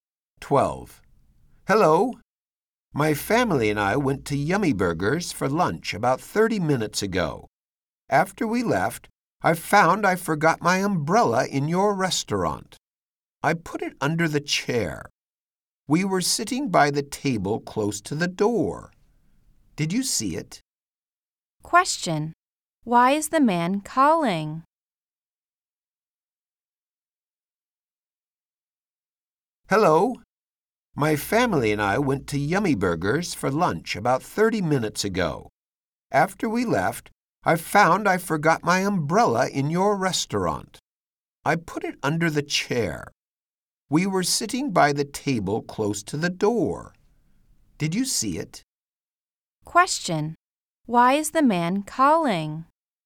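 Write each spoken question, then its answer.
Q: Why is the man calling?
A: He forgot his umbrella in the restaurant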